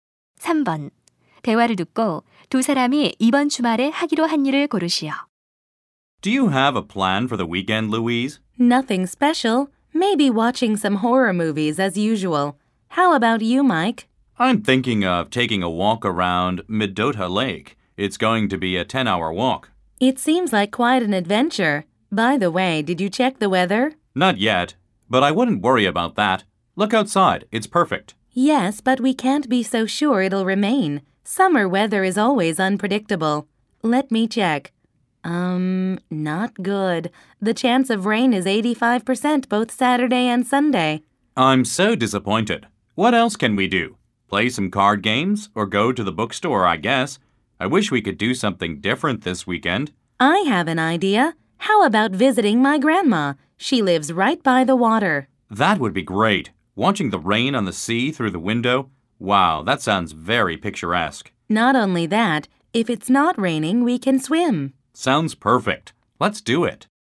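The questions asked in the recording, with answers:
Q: 대화를 듣고 두 사람이 이번 주말에 하기로 한 일을 고르시오.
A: 할머니 댁 방문하기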